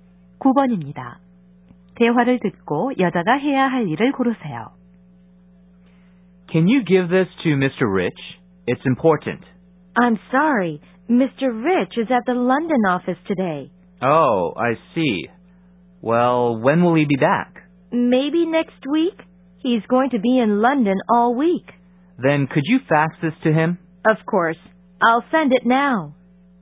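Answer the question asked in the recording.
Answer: Mr. Rich에게 서류를 팩스로 보내기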